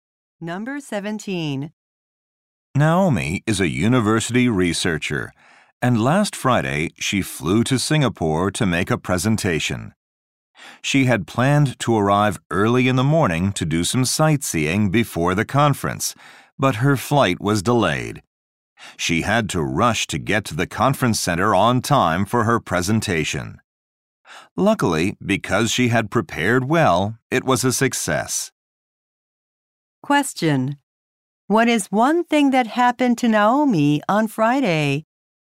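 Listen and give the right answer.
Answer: Her flight was delayed.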